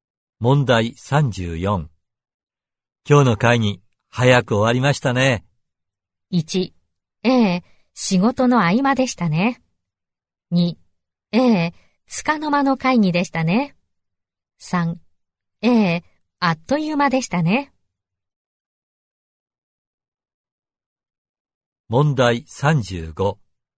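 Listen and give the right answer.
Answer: 3: ええ、あっという間でしたね。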